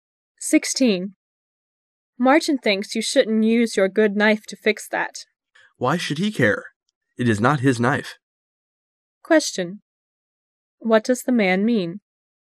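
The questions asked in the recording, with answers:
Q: What does the man mean?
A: It's none of Martin's business because it isn't his knife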